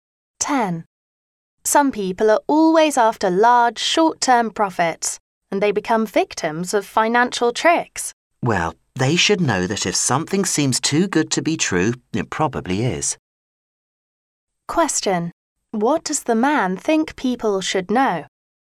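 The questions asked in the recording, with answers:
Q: What does the man think people should know?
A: Things that seem too good to be true probably are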